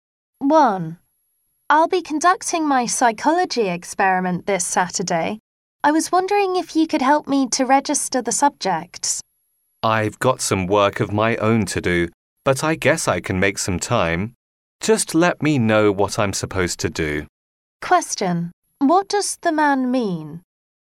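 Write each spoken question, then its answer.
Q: What does the man mean?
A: He is willing to help register the subjects.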